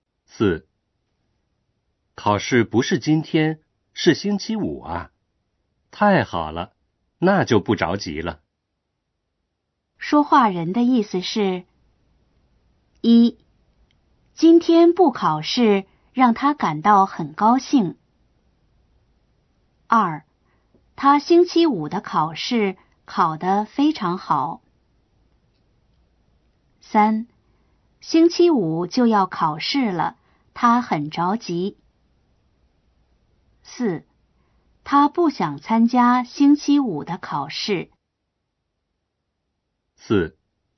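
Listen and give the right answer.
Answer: 1: 今天不考试让他感到很高兴。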